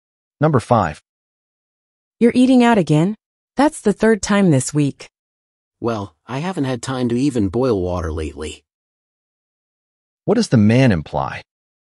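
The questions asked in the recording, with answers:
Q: What does the man imply?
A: He has been too busy to cook.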